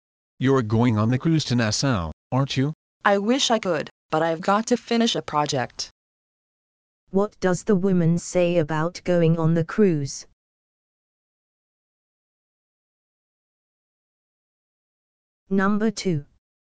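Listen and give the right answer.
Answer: She can't go because she has to finish a project.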